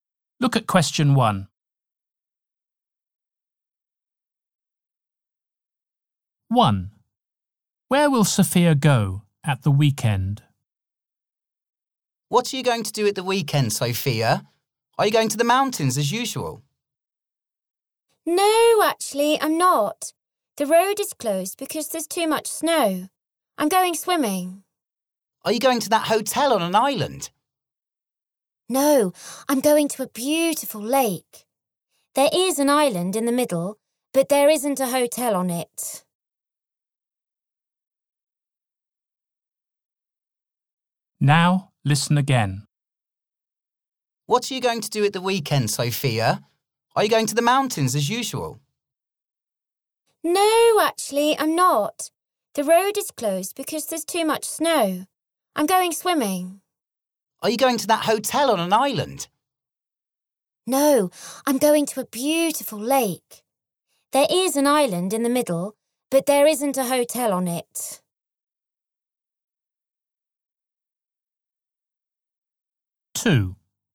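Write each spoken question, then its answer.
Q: Where will Sophia go at the weekend?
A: To a lake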